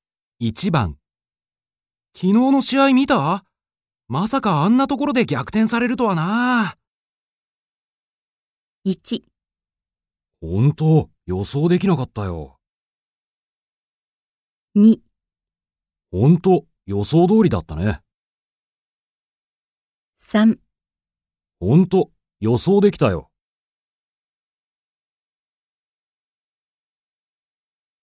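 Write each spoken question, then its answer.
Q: 昨日の試合見た?まさかあんなところで逆転されるとはな。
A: 1: 本当、予想できなかったよ。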